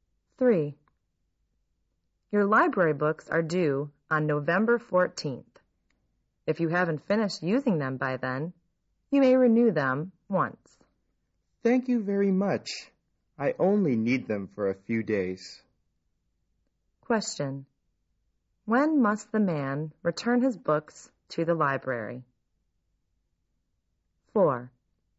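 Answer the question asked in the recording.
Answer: By November 14th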